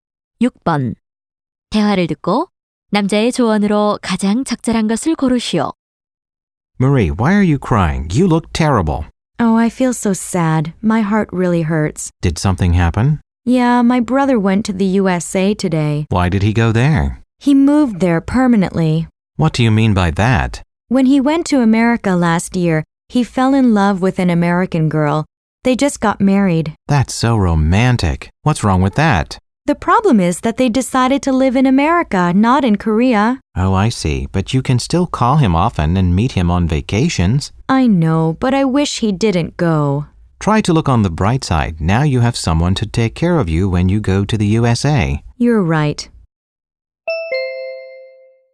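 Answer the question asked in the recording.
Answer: 긍정적인 면을 보라(형이 미국에 있으니 미국에 가면 돌봐줄 사람이 생긴다)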